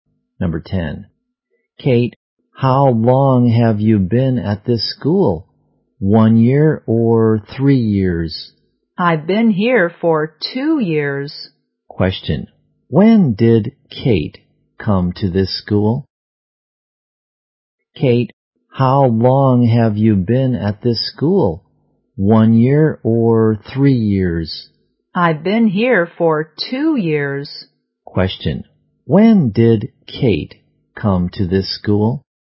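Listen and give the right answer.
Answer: Two years ago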